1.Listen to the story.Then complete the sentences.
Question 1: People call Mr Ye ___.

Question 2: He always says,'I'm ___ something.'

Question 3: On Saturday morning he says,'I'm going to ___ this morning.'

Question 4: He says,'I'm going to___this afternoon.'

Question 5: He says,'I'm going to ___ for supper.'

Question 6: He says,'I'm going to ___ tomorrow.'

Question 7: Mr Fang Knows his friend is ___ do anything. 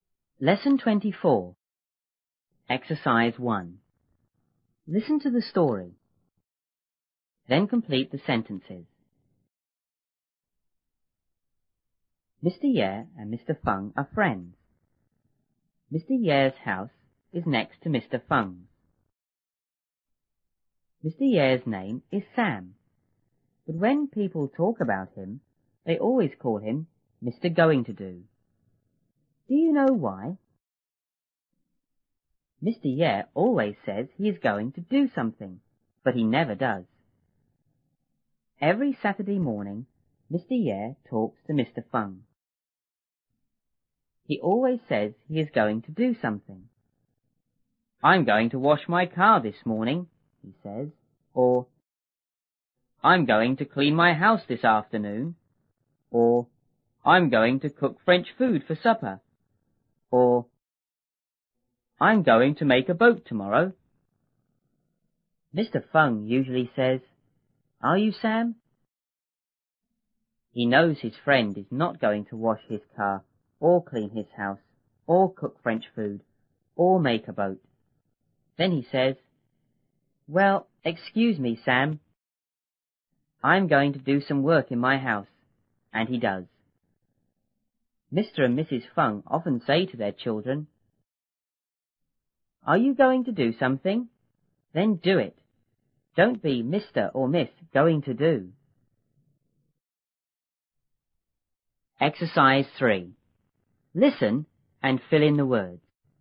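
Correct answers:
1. Mr Going-to-Do
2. going to do
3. wash my car
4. clean my house
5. cook French food
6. make a boat
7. not going to

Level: 六年级下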